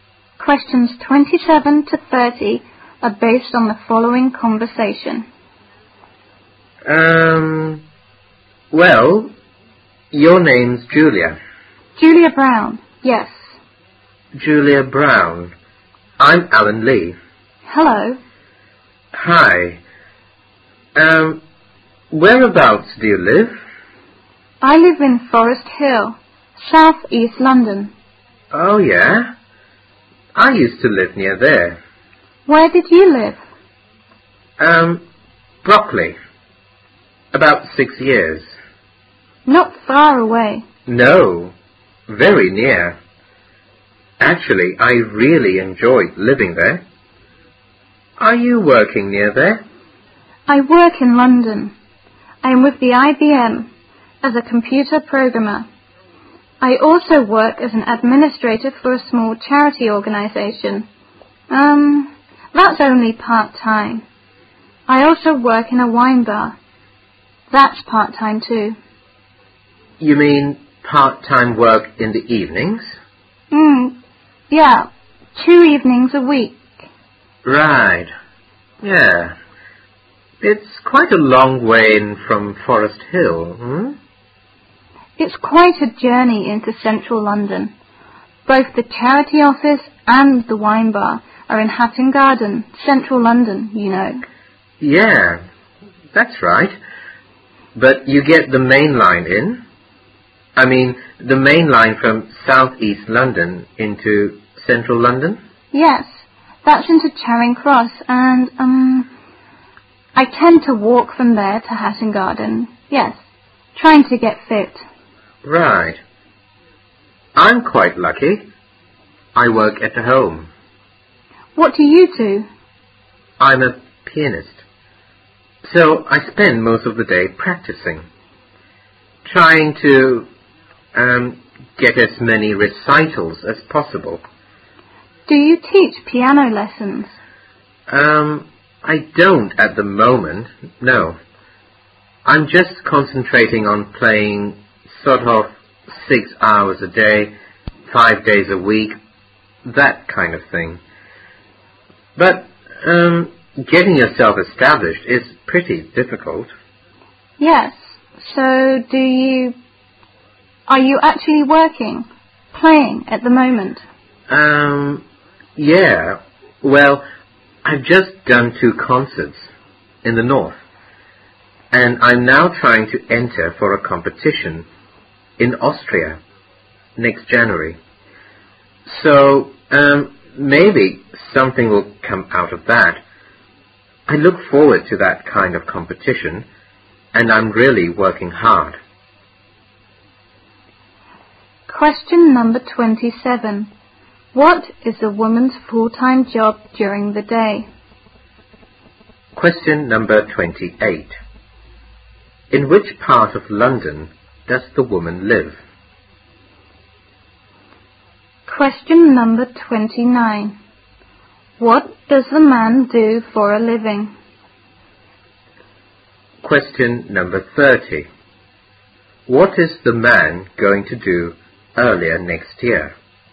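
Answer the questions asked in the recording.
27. Computer programmer at IBM
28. Forest Hill, South East London
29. He is a pianist
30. Enter a competition in Austria in January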